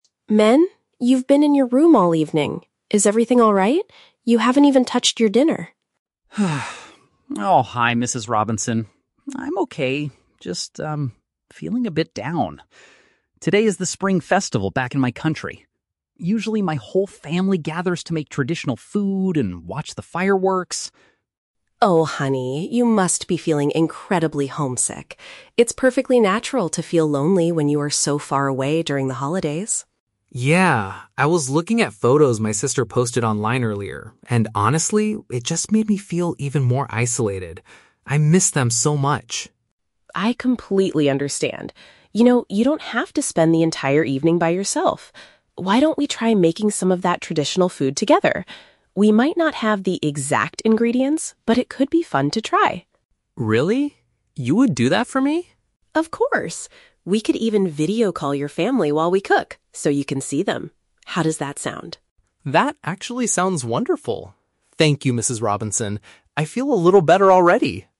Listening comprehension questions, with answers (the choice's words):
Listen to a conversation between an international student, Minh, and his host mother, Mrs. Robinson. Choose the correct answer (A, B, or C) for each question.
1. What is the main reason Minh is feeling upset?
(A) He dislikes the dinner that Mrs. Robinson prepared for him.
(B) He is missing an important cultural celebration back home.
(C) He had a disagreement with his sister on the internet.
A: He is missing an important cultural celebration back home.

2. How did seeing pictures online affect Minh's mood?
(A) They made him feel even more disconnected from his family.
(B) They reminded him to buy traditional ingredients for the holiday.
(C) They helped him forget about his negative feelings for a while.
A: They made him feel even more disconnected from his family.

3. What does Mrs. Robinson offer to do to help Minh?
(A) Take him out to see a fireworks display in the city.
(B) Leave him alone in his room so he can get some rest.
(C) Cook a familiar dish with him and contact his relatives.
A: Cook a familiar dish with him and contact his relatives.

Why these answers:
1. Minh states he is "feeling a bit down" because "Today is the Spring Festival back in my country." Option (B) paraphrases this perfectly. Option (A) is a trap; Mrs. Robinson mentions he hasn't eaten his dinner, but that is a result of his sadness, not the cause. Option (C) is a trap; his sister is mentioned, but there was no argument.
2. Minh says that looking at his sister's photos made him feel "even more isolated." Option (A) uses "disconnected" as a synonym for isolated. Option (B) uses the word "traditional," which was mentioned elsewhere in the audio, but not related to the photos. Option (C) is the exact opposite of how he felt.
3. Mrs. Robinson suggests they try "making some of that traditional food together" and "video call your family." Option (C) uses synonyms ("familiar dish," "contact his relatives") to capture both ideas. Option (A) is a trap; "fireworks" were mentioned by Minh as a tradition in his country, not a plan for tonight. Option (B) is a trap; she explicitly tells him he shouldn't spend the evening by himself.

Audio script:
You've been in your room all evening. Is everything alright? You haven't even touched your dinner.
Minh: Oh, hi Mrs. Robinson. I'm okay, just... um, feeling a bit down. Today is the Spring Festival back in my country. Usually, my whole family gathers to make traditional food and watch the fireworks.
Mrs. Robinson: Oh, honey. You must be feeling incredibly homesick. It's perfectly natural to feel lonely when you are so far away during the holidays.
Minh: Yeah. I was looking at photos my sister posted online earlier, and honestly, it just made me feel even more isolated. I miss them so much.
Mrs. Robinson: I completely understand. You know, you don't have to spend the entire evening by yourself. Why don't we try making some of that traditional food together? We might not have the exact ingredients, but it could be fun to try.
Minh: Really? You would do that for me?
Mrs. Robinson: Of course! We could even video call your family while we cook so you can see them. How does that sound?
Minh: That actually sounds wonderful. Thank you, Mrs. Robinson. I feel a little better already.